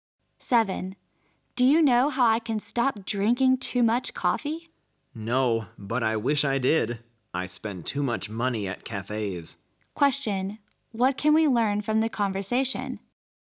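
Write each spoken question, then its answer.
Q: what can we learn from the conversation?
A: Both of them drink too much coffee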